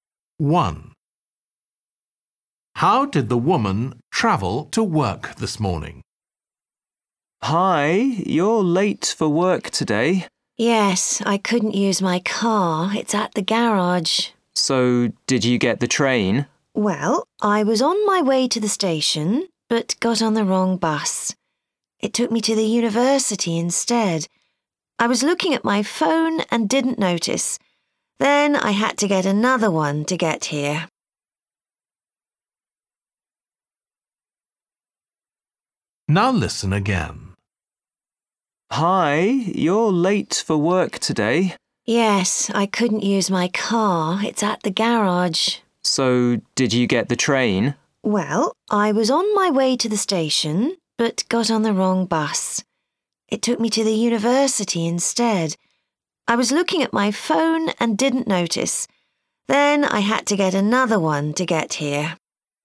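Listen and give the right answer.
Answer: by bus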